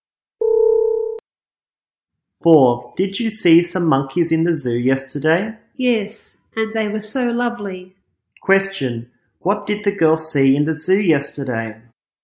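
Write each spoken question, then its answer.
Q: what did the girl see in the zoo yesterday?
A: Monkeys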